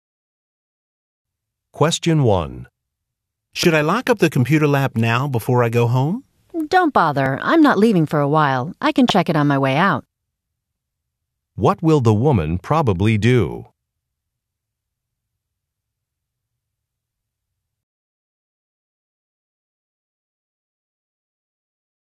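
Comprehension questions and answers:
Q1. What will the woman probably do?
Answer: Lock the computer lab later

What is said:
(Narrator) Question 1
(Man) Should I lock up the computer lab now before I go home?
(Woman) Don't bother. I'm not leaving for a while—I can check it on my way out.
(Narrator) What will the woman probably do?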